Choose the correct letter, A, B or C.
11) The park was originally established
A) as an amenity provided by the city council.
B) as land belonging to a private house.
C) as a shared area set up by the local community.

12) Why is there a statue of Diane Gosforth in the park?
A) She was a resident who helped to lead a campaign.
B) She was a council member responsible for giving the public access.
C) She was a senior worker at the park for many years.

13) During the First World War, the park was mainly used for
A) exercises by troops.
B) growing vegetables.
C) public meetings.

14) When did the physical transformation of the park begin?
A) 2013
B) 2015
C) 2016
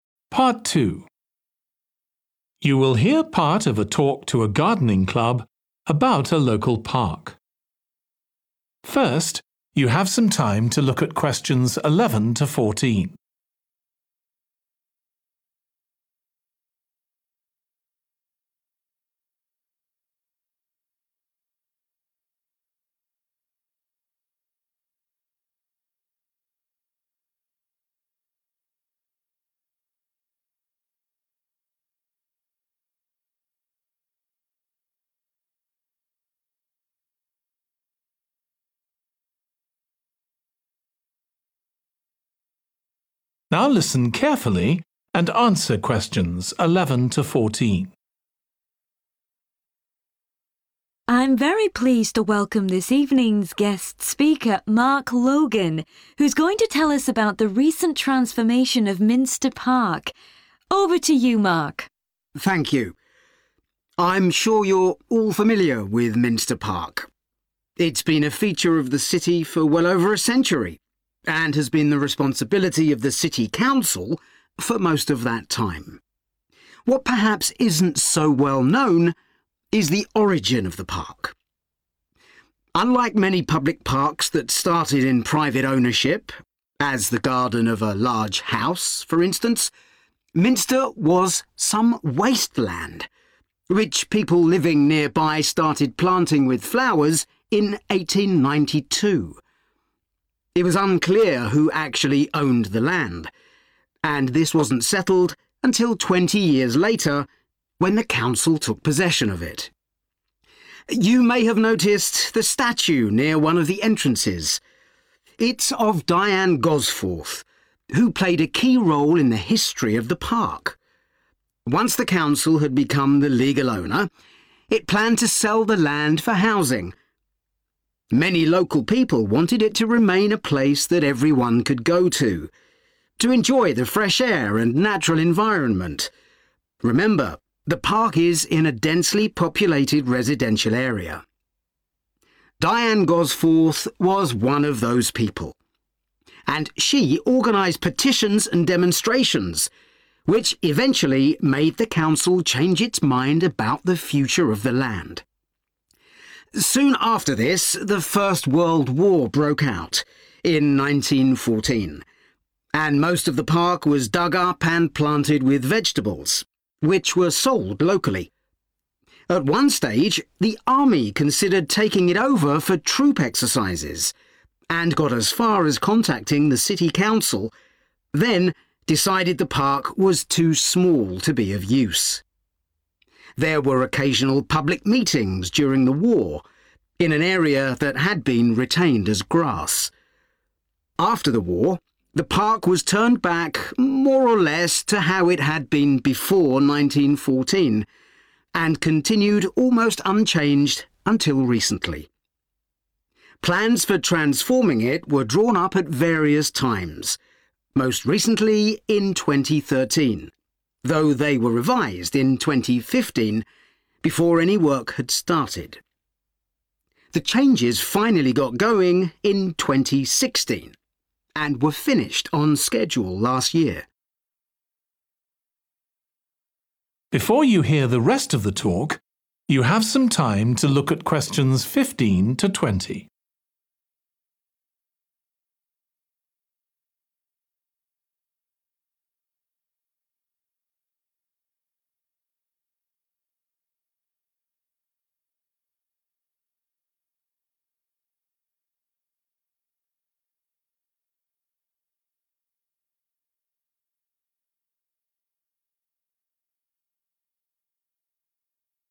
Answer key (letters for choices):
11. C
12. A
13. B
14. C

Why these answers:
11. The correct answer is C (as a shared area set up by the local community) because the excerpt mentions that Minster Park started as wasteland and people living nearby began planting flowers there in 1892. This shows that it was not initially a formal city council amenity or part of a private house's land, but rather a community effort to create a shared area for everyone.
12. The correct answer is that Diane Gosforth was a resident who helped lead a campaign because the excerpt mentions her organizing petitions and demonstrations, which are actions commonly associated with leading a campaign.
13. The correct answer is B because the information from the excerpt directly states that during the First World War, the park's space was utilized for planting vegetables, which were later sold locally. This aligns perfectly with answer choice B, making it the correct selection.
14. The correct answer is C (2016) because the information in the excerpt directly states that the physical transformation of Minster Park started in 2016, aligning perfectly with the answer choice C.

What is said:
I'm very pleased to welcome this evening's guest speaker, Mark Logan, who's going to tell us about the recent transformation of Minster Park. Over to you, Mark.
MARK:
Thank you. I'm sure you're all familiar with Minster Park. It's been a feature of the city for well over a century, and has been the responsibility of the city council for most of that time. What perhaps isn't so well known is the origin of the park: unlike many public parks that started in private ownership, as the garden of a large house, for instance, Minster was some waste land, which people living nearby started planting with flowers in 1892. It was unclear who actually owned the land, and this wasn't settled until 20 years later, when the council took possession of it.
You may have noticed the statue near one of the entrances. It's of Diane Gosforth, who played a key role in the history of the park. Once the council had become the legal owner, it planned to sell the land for housing. Many local people wanted it to remain a place that everyone could go to, to enjoy the fresh air and natural environment – remember the park is in a densely populated residential area. Diane Gosforth was one of those people, and she organised petitions and demonstrations, which eventually made the council change its mind about the future of the land.
Soon after this the First World War broke out, in 1914, and most of the park was dug up and planted with vegetables, which were sold locally. At one stage the army considered taking in over for troop exercises and got as far as contacting the city council, then decided the park was too small to be of use. There were occasional public meetings during the war, in an area that had been retained as grass.
After the war, the park was turned back more or less to how it had been before 1914, and continued almost unchanged until recently. Plans for transforming it were drawn up at various times, most recently in 2013, though they were revised in 2015, before any work had started. The changes finally got going in 2016, and were finished on schedule last year.